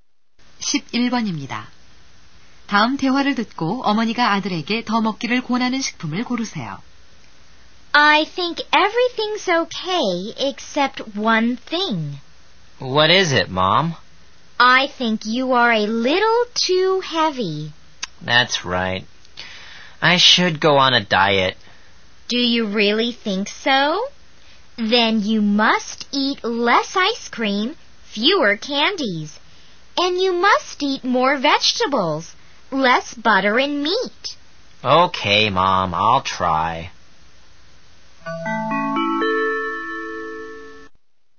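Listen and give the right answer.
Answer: 채소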